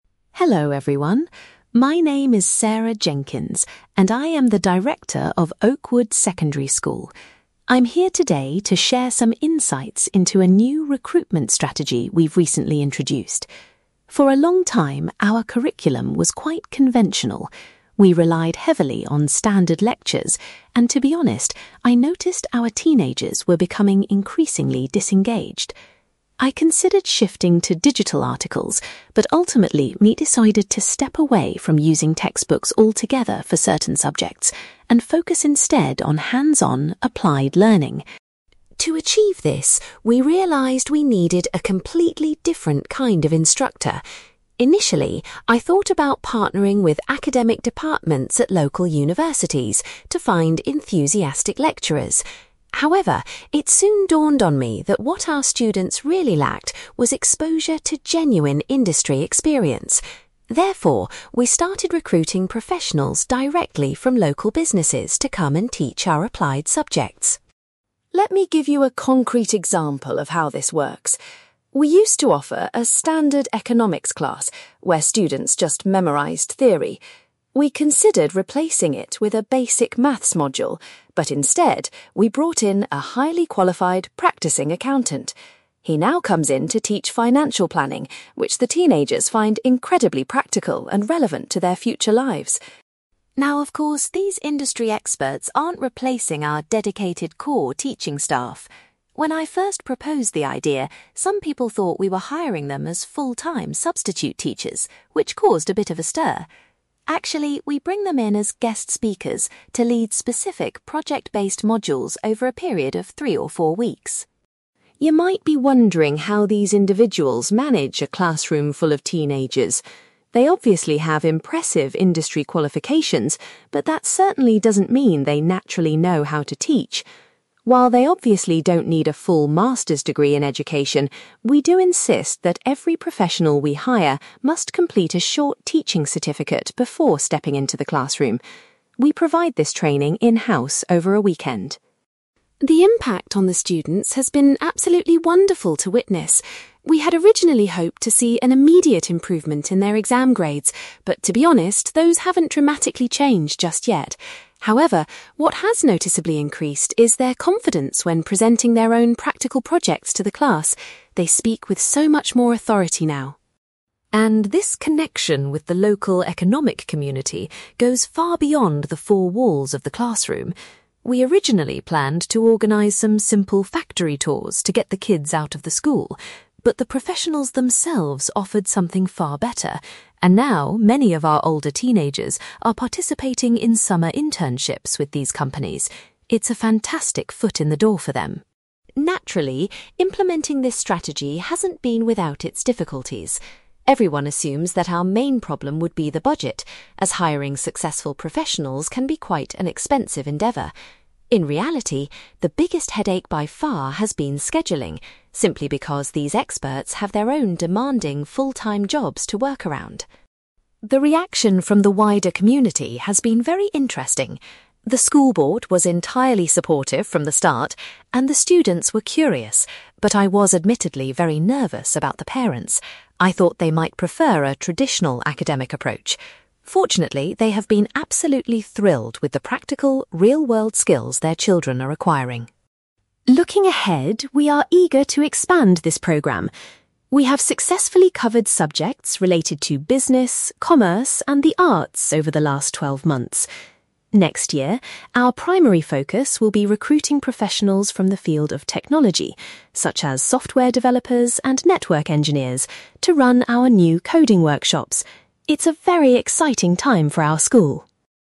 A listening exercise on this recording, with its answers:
You will hear a school director called Sarah Jenkins giving a presentation about a new staff recruitment strategy. For questions 9-18, complete the sentences with a word or short phrase.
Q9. Sarah explains that the school is trying to stop using (9)........................... in favour of practical learning.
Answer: textbooks

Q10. Rather than contacting universities, Sarah recruited instructors who worked in (10)........................... .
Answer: local businesses

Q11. An accountant was hired to instruct students in a subject called (11)........................... .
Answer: financial planning

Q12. The professionals are invited to the school to act as (12)........................... for short courses.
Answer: guest speakers

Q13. All recruited professionals are required to obtain a (13)........................... prior to taking a class.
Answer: teaching certificate

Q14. Sarah has noticed a significant improvement in the students' (14)........................... during project presentations.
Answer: confidence

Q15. The new initiative has provided older students with the opportunity to do (15)........................... .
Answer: summer internships

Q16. Sarah reveals that dealing with (16)........................... has been the most challenging aspect of the programme.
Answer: scheduling

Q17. Sarah says she was anxious about how the (17)........................... would react to this new strategy.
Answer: parents

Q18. For the coming year, the school aims to hire experts who work in (18)........................... .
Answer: technology

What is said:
Sarah Jenkins: Hello, everyone. My name is Sarah Jenkins, and I am the director of Oakwood Secondary School. I'm here today to share some insights into a new recruitment strategy we've recently introduced. For a long time, our curriculum was quite conventional. We relied heavily on standard lectures, and to be honest, I noticed our teenagers were becoming increasingly disengaged. I considered shifting to digital articles, but ultimately, we decided to step away from using textbooks altogether for certain subjects, and focus instead on hands-on, applied learning.
To achieve this, we realised we needed a completely different kind of instructor. Initially, I thought about partnering with academic departments at local universities to find enthusiastic lecturers. However, it soon dawned on me that what our students really lacked was exposure to genuine industry experience. Therefore, we started recruiting professionals directly from local businesses to come and teach our applied subjects.
Let me give you a concrete example of how this works. We used to offer a standard economics class where students just memorised theory. We considered replacing it with a basic maths module, but instead, we brought in a highly qualified, practising accountant. He now comes in to teach financial planning, which the teenagers find incredibly practical and relevant to their future lives.
Now, of course, these industry experts aren't replacing our dedicated core teaching staff. When I first proposed the idea, some people thought we were hiring them as full-time substitute teachers, which caused a bit of a stir! Actually, we bring them in as guest speakers to lead specific, project-based modules over a period of three or four weeks.
You might be wondering how these individuals manage a classroom full of teenagers. They obviously have impressive industry qualifications, but that certainly doesn't mean they naturally know how to teach! While they obviously don't need a full master's degree in education, we do insist that every professional we hire must complete a short teaching certificate before stepping into the classroom. We provide this training in-house over a weekend.
The impact on the students has been absolutely wonderful to witness. We had originally hoped to see an immediate improvement in their exam grades, but to be honest, those haven't dramatically changed just yet. However, what has noticeably increased is their confidence when presenting their own practical projects to the class. They speak with so much more authority now.
And this connection with the local economic community goes far beyond the four walls of the classroom. We originally planned to organise some simple factory tours to get the kids out of the school. But the professionals themselves offered something far better, and now many of our older teenagers are participating in summer internships with these companies. It's a fantastic foot in the door for them.
Naturally, implementing this strategy hasn't been without its difficulties. Everyone assumes that our main problem would be the budget, as hiring successful professionals can be quite an expensive endeavour. In reality, the biggest headache by far has been scheduling, simply because these experts have their own demanding, full-time jobs to work around.
The reaction from the wider community has been very interesting. The school board was entirely supportive from the start, and the students were curious, but I was admittedly very nervous about the parents. I thought they might prefer a traditional academic approach. Fortunately, they have been absolutely thrilled with the practical, real-world skills their children are acquiring.
Looking ahead, we are eager to expand this programme. We have successfully covered subjects related to business, commerce, and the arts over the last twelve months. Next year, our primary focus will be recruiting professionals from the field of technology, such as software developers and network engineers, to run our new coding workshops. It's a very exciting time for our school!

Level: B2